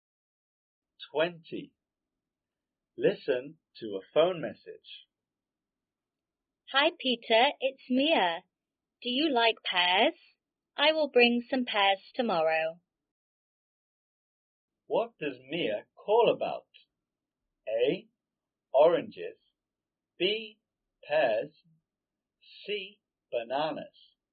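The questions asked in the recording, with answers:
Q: What does Mia call about?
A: B: Pears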